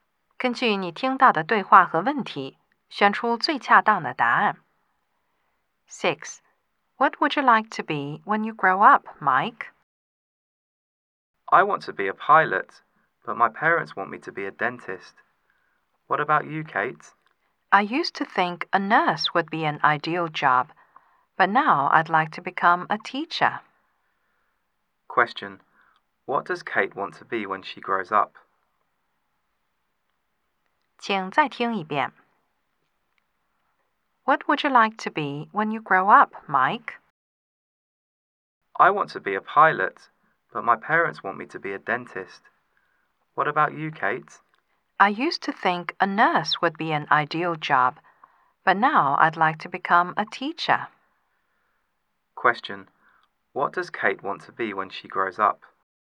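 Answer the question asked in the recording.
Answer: A teacher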